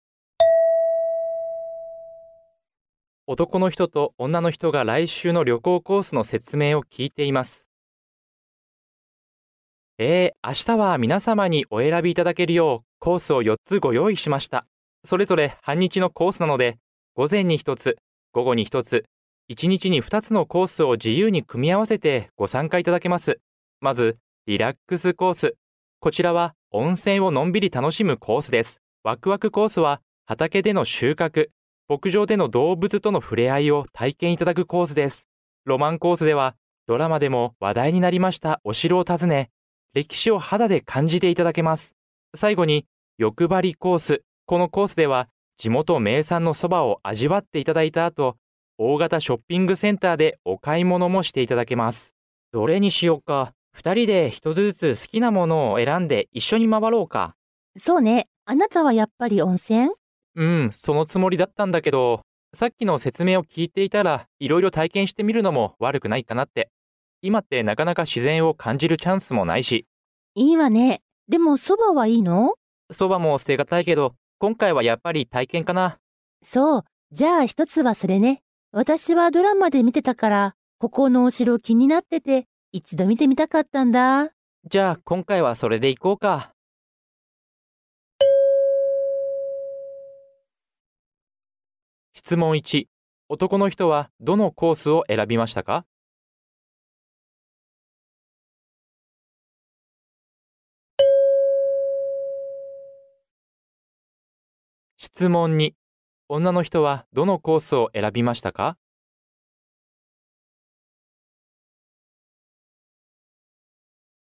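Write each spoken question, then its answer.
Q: 男の人はどのコースを選びましたか?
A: ワクワクコース

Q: 女の人はどのコースを選びましたか?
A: ロマンコース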